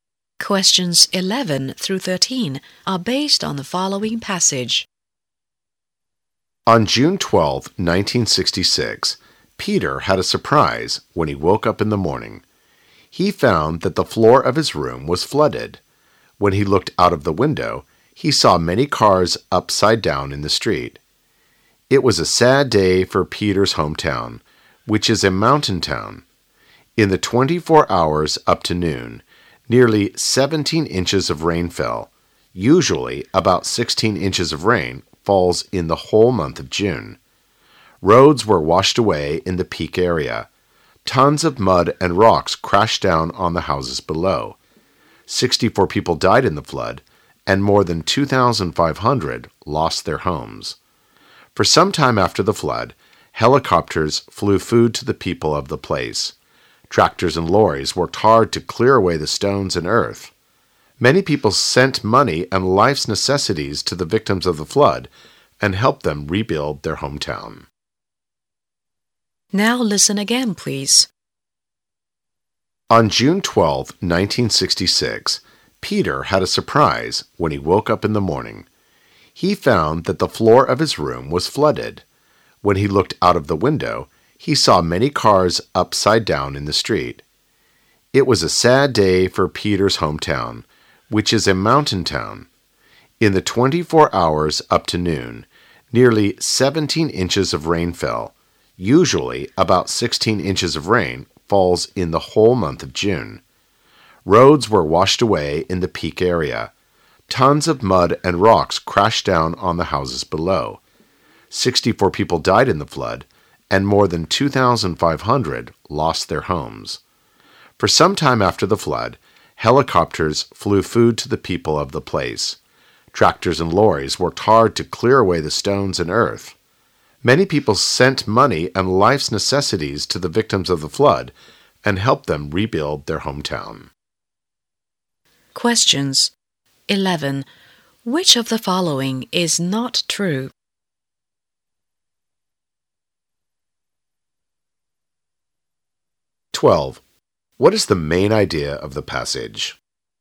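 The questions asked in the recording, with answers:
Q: What is the main idea of the passage?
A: A terrible flood hit Peter's mountain hometown.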